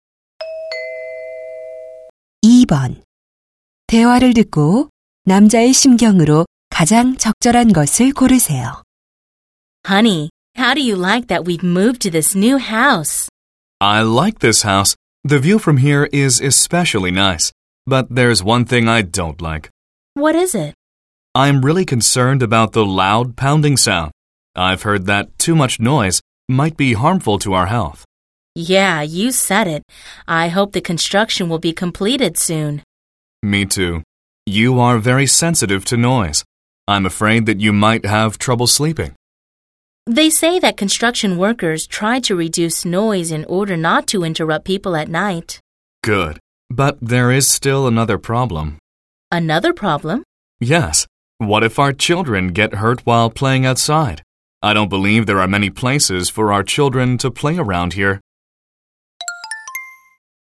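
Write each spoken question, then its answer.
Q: 대화를 듣고 남자의 심경으로 가장 적절한 것을 고르세요.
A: 걱정스러움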